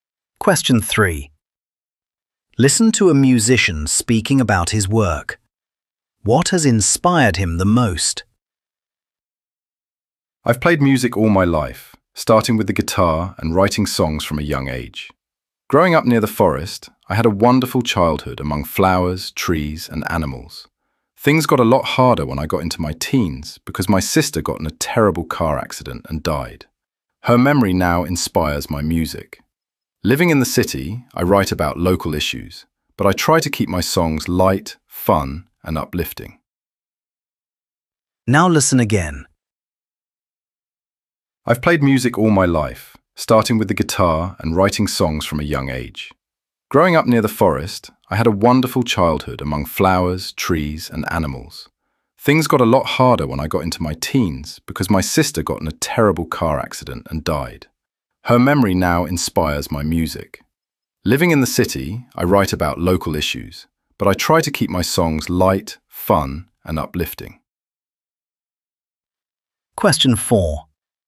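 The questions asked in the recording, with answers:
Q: What has inspired him the most?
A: The memory of his sister, who died in a car accident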